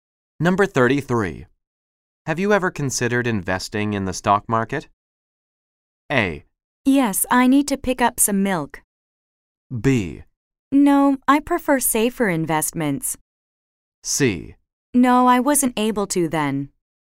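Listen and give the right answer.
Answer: B: No, I prefer safer investments.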